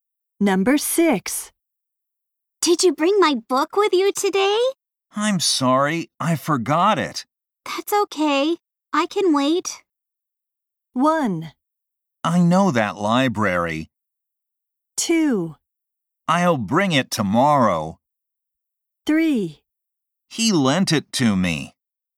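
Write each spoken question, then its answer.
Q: That's okay, I can wait.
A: 2: I'll bring it tomorrow.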